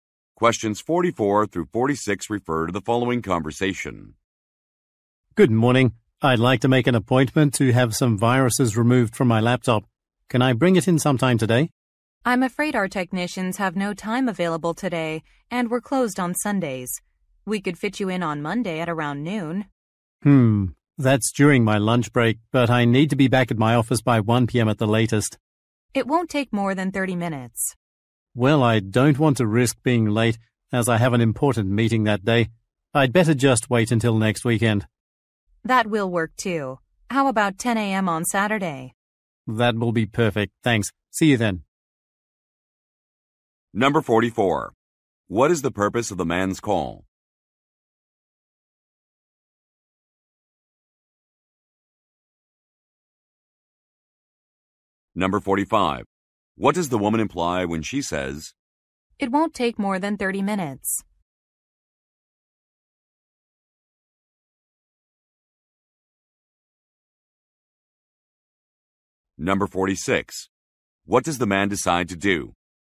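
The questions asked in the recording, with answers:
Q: What is the purpose of the man's call?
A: To make an appointment to have viruses removed from his laptop

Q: What does the woman imply when she says,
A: He would be back at his office in time

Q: What does the man decide to do?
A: Wait until next weekend (Saturday at 10 a.m.)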